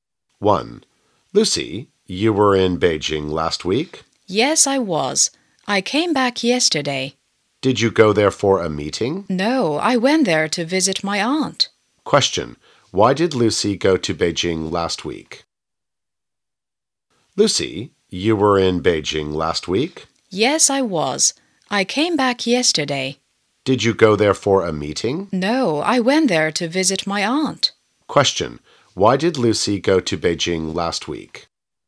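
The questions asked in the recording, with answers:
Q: Why did Lucy go to Beijing last week?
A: To visit her aunt.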